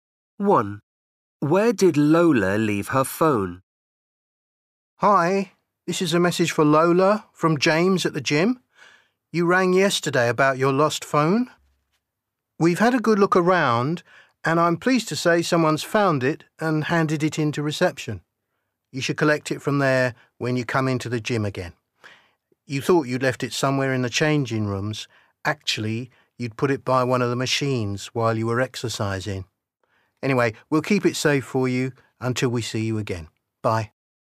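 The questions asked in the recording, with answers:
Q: Where did Lola leave her phone?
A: by one of the machines in the gym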